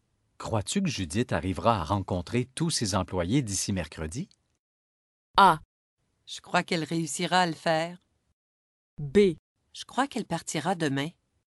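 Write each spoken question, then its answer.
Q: Crois-tu que Judith arrivera à rencontrer tous ses employés d'ici mercredi?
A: A: Je crois qu'elle réussira à le faire.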